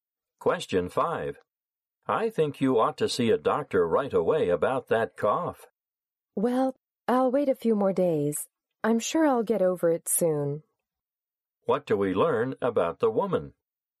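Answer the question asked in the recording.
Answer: She doesn't think she needs to see a doctor yet; she expects her cough to go away soon.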